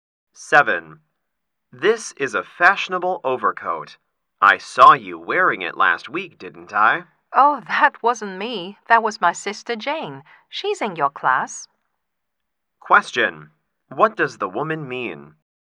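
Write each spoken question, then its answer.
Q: What does the woman mean?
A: The man saw her sister Jane, not her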